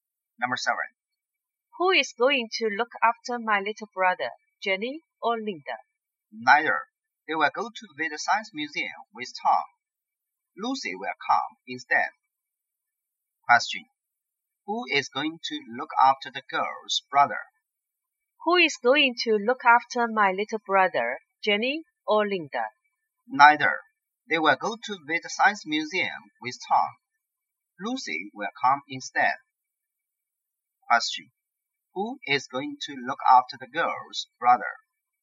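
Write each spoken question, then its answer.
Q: Who is going to look after the girl's brother?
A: Lucy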